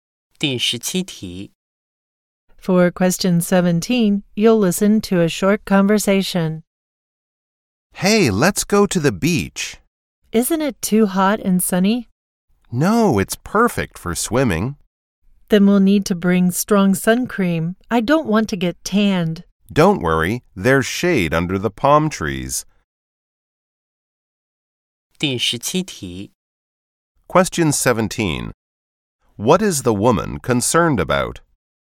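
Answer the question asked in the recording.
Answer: Getting tanned by the sun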